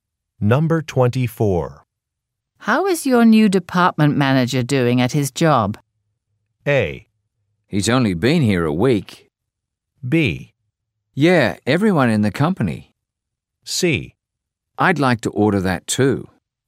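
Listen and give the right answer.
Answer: A: He's only been here a week.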